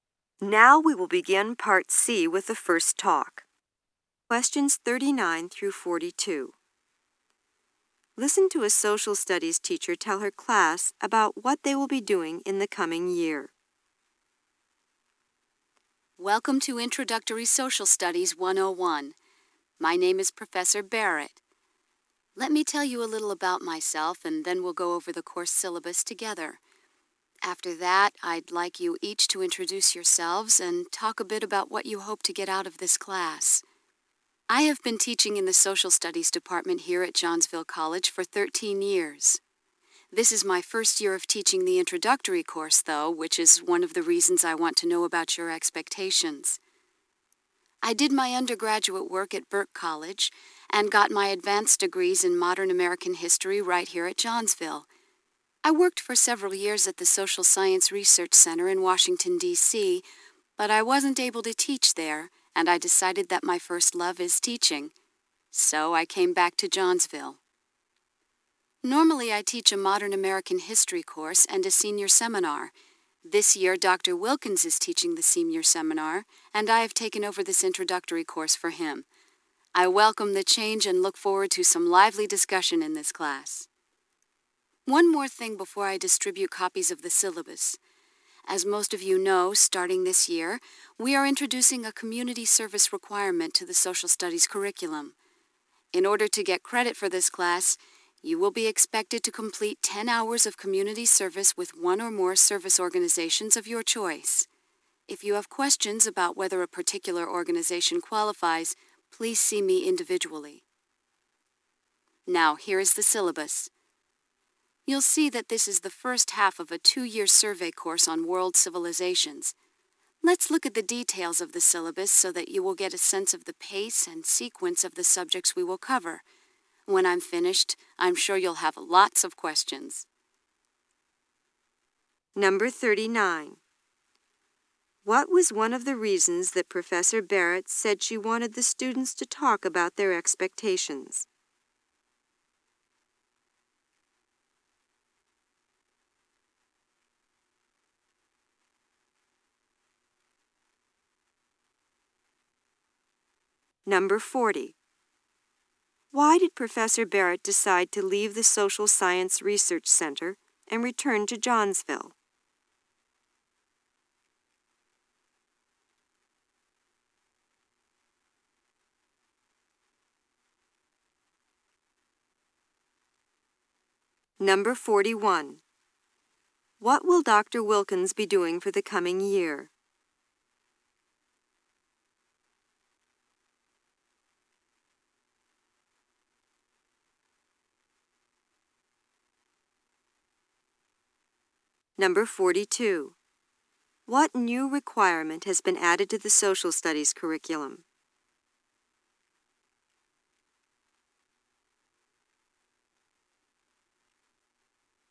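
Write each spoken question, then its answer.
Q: What was one of the reasons that Professor Barrett said she wanted the students to talk about their expectations?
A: It is her first year teaching the introductory course.

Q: Why did Professor Barrett decide to leave the Social Science Research Center and return to Johnsville?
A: Her first love is teaching, and she couldn't teach there.

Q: What will Dr. Wilkins be doing for the coming year?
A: Teaching the senior seminar.

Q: What new requirement has been added to the social studies curriculum?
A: 10 hours of community service.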